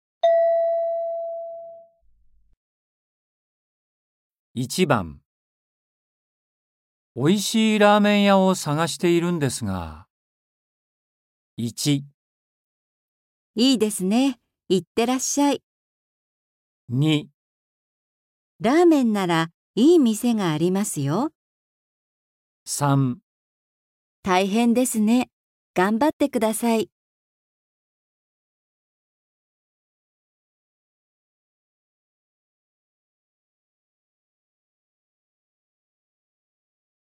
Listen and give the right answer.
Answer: 2

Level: N4.42